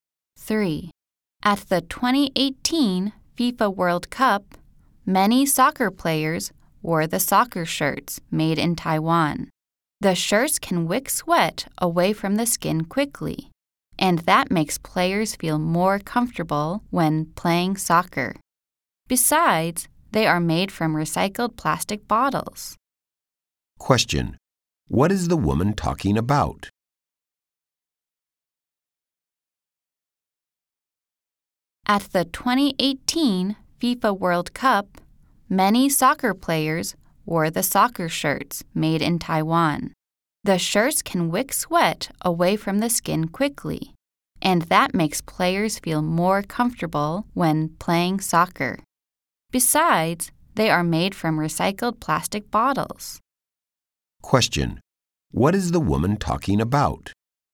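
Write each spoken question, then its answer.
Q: What is the woman talking about?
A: Soccer shirts made in Taiwan from recycled plastic bottles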